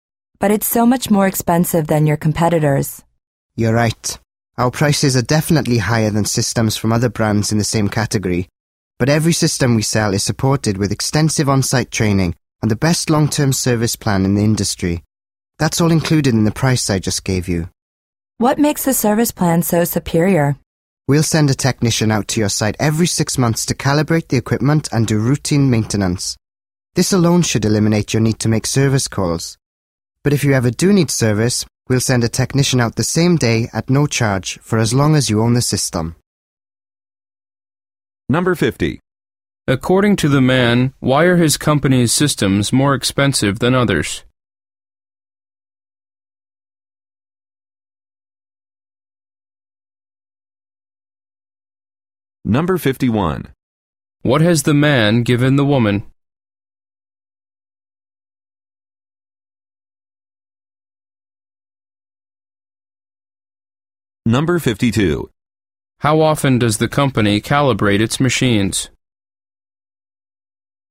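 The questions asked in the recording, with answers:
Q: According to the man, why are his company's systems more expensive than others?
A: Because the price includes extensive on-site training and the best long-term service plan

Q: What has the man given the woman?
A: A price quote

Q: How often does the company calibrate its machines?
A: Every 6 months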